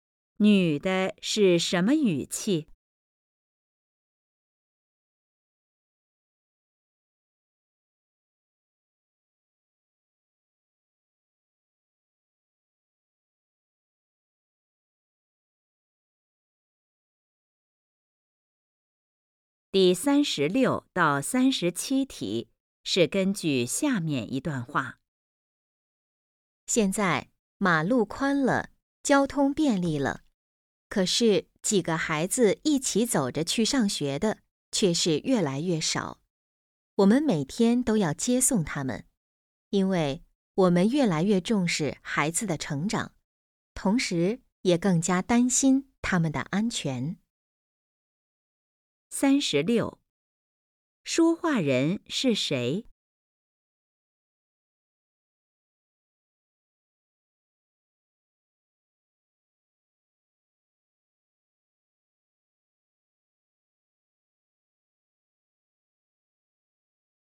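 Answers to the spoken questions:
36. 家长
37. 上学要父母接送,很少自己走着去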